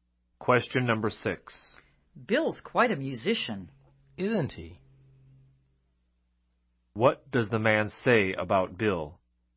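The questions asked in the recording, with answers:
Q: What does the man say about Bill?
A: He agrees that Bill is a very good musician.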